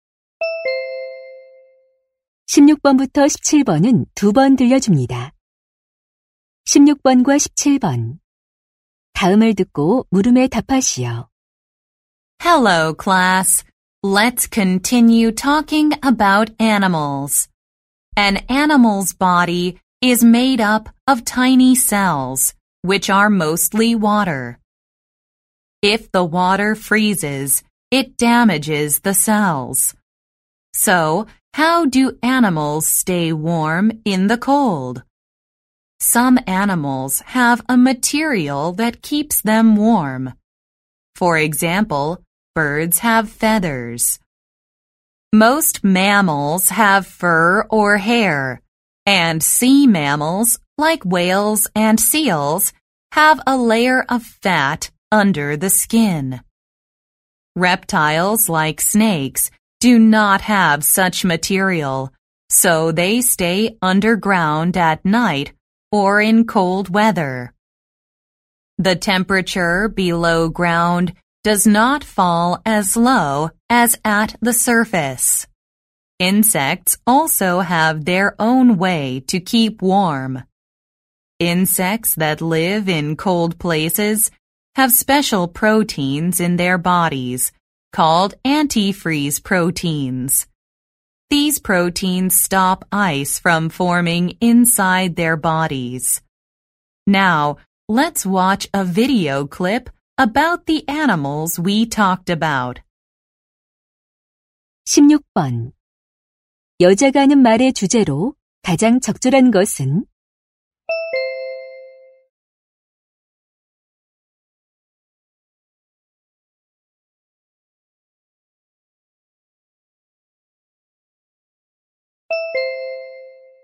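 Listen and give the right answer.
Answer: 동물들이 추위 속에서 체온을 유지하는 방법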